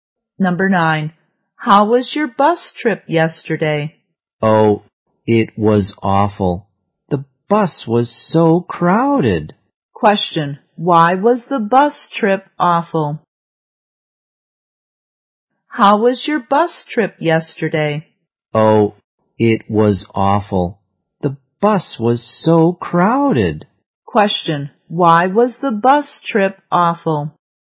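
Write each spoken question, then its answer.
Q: Why was the bus trip awful?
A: The bus was so crowded.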